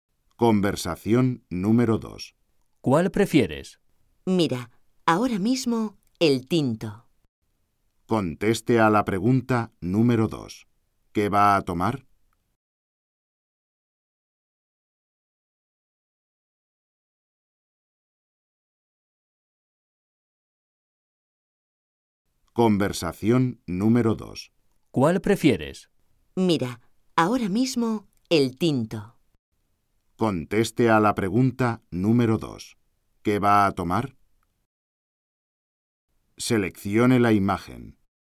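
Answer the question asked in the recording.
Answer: Vino tinto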